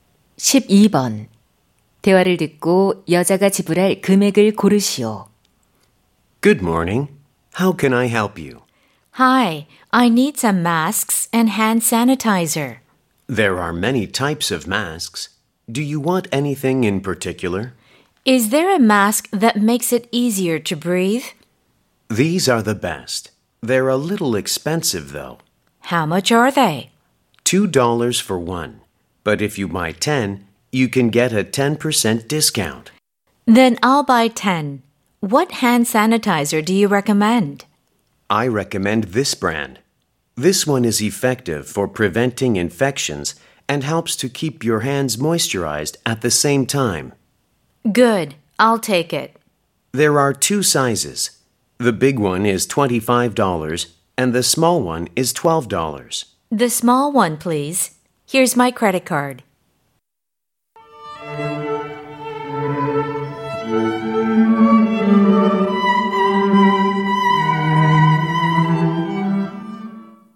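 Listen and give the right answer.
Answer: $30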